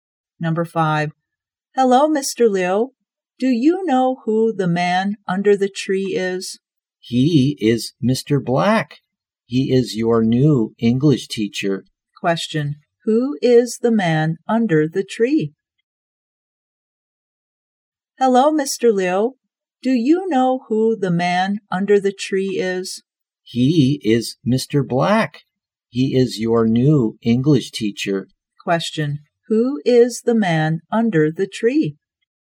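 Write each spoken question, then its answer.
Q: who is the man under the tree?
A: Mr. Black, the new English teacher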